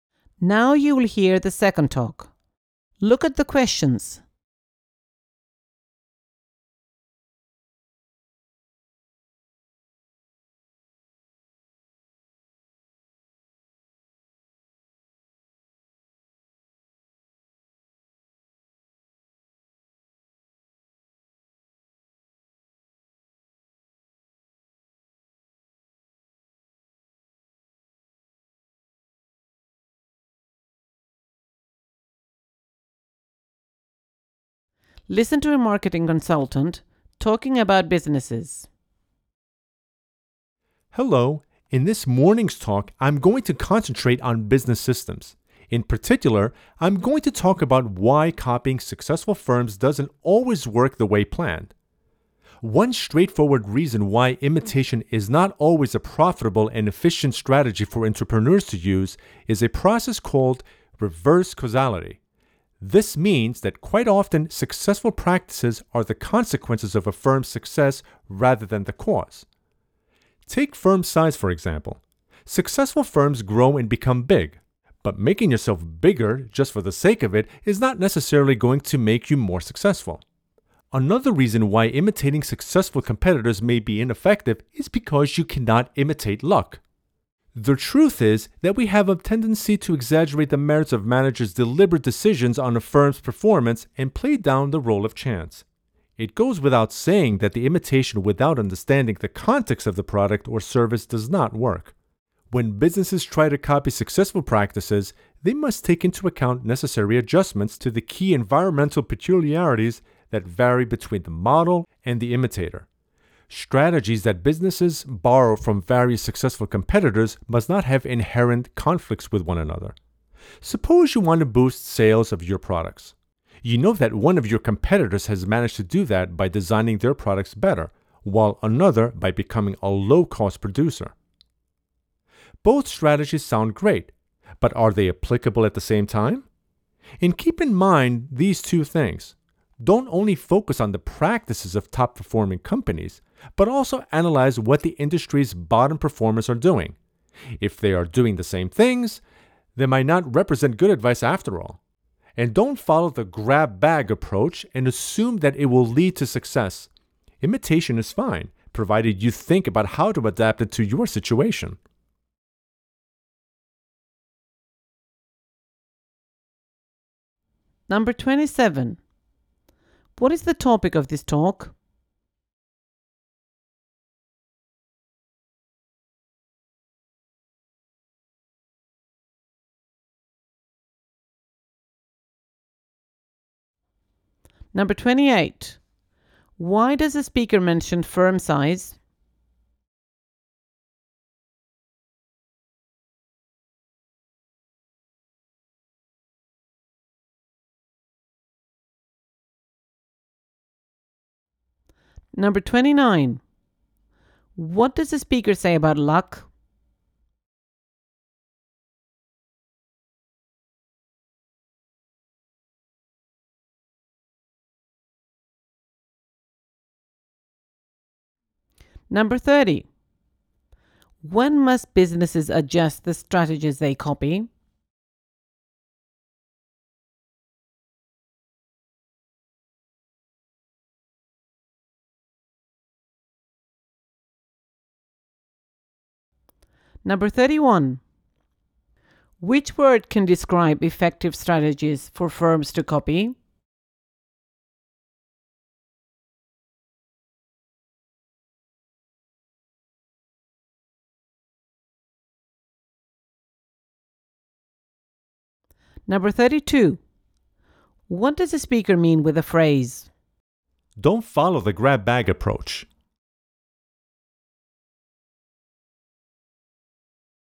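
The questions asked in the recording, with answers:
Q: What is the topic of this talk?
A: Why copying successful firms doesn't always work

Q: Why does the speaker mention firm size?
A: As an example of reverse causality

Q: What does the speaker say about luck?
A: It cannot be imitated, and its role is often played down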